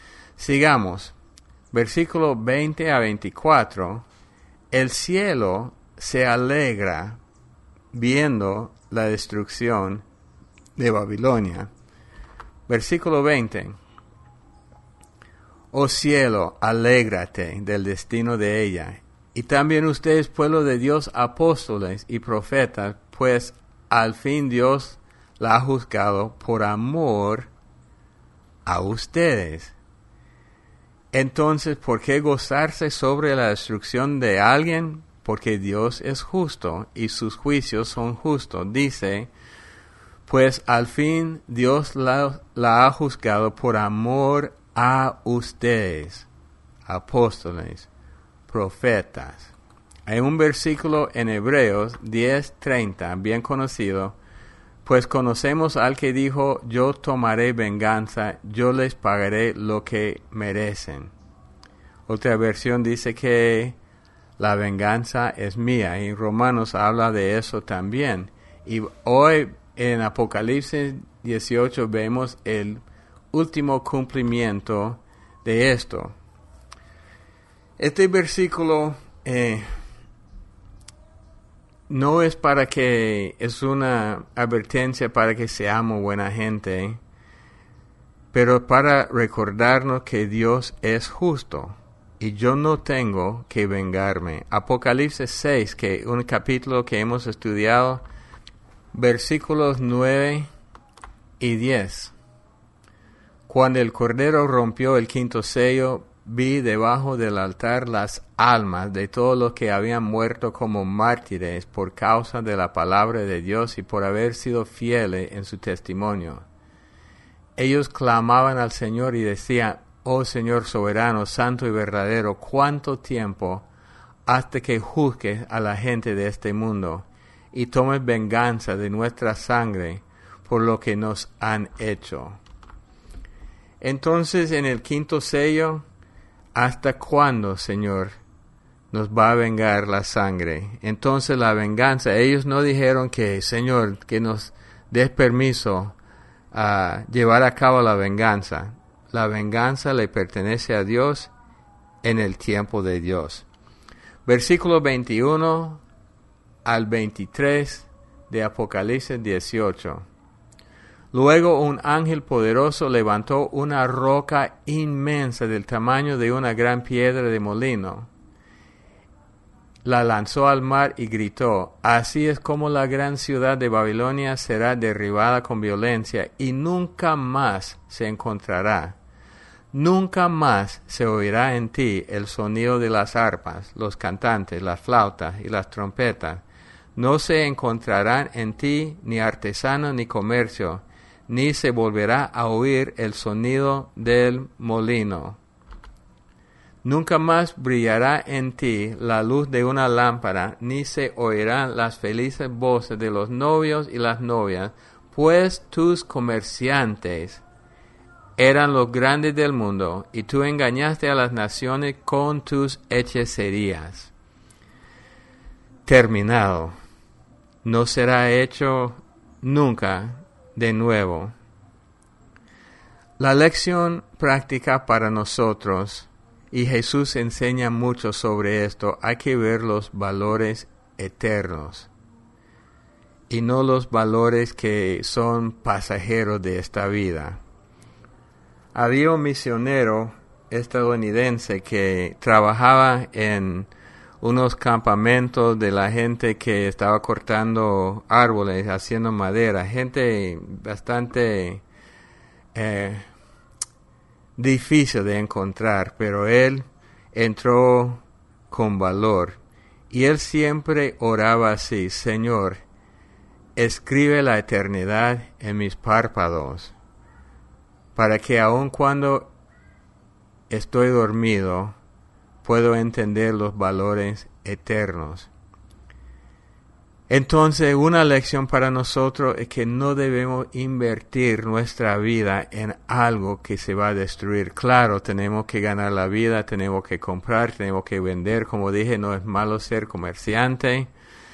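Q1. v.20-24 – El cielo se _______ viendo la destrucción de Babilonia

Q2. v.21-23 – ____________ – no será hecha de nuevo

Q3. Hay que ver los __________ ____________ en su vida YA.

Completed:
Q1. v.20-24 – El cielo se alegra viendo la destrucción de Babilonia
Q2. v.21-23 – Terminado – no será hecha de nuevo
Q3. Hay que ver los valores eternos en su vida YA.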